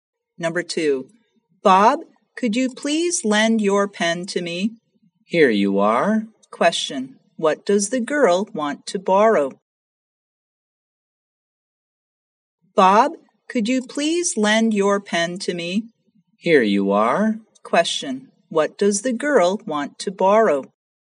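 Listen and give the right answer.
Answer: A pen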